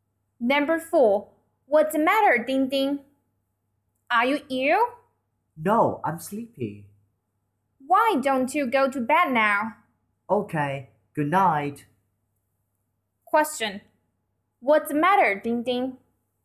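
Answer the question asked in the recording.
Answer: He's sleepy.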